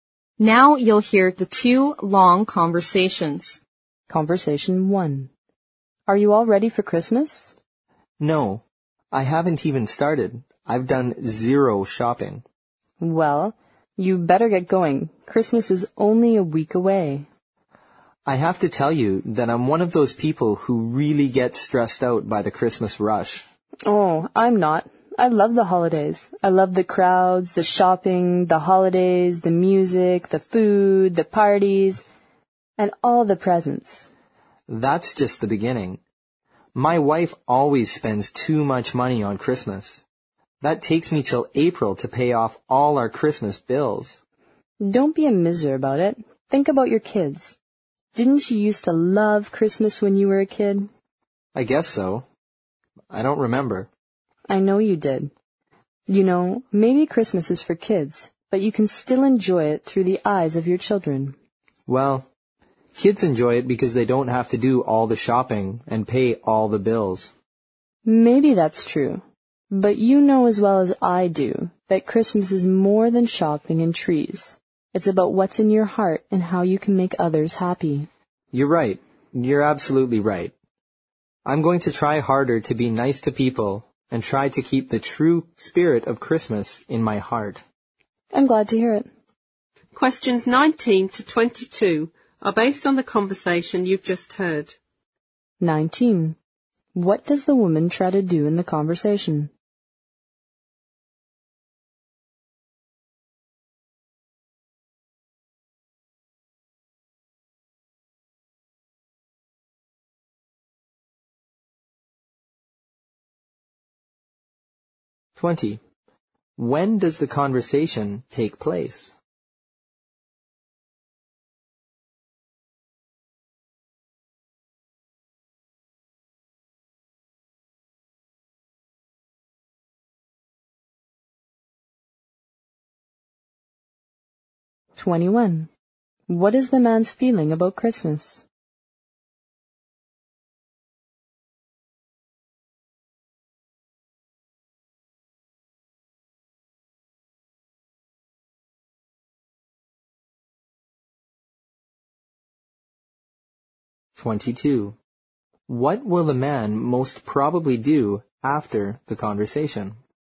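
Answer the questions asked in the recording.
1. Persuade the man to enjoy Christmas
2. About a week before Christmas
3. It stresses him out.
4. Try to be nice to people and keep the true spirit of Christmas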